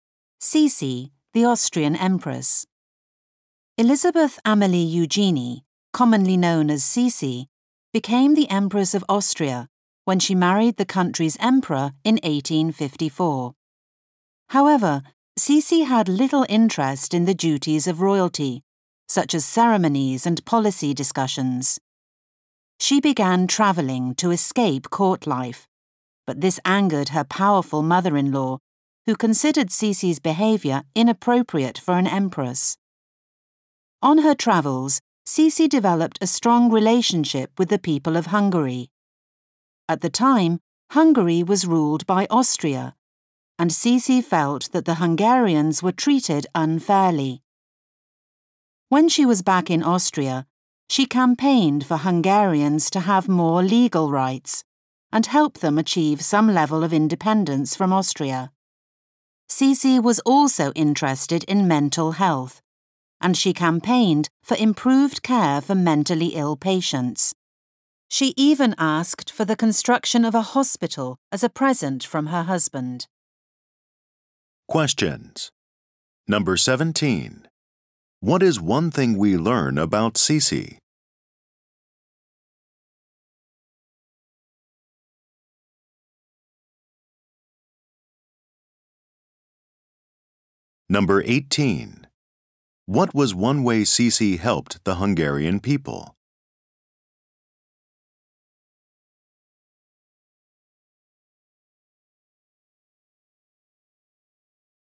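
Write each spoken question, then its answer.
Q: What is one thing we learn about Cece?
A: She had little interest in royal duties and travelled to escape court life

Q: What was one way Cece helped the Hungarian people?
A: She campaigned for them to have more legal rights and some independence from Austria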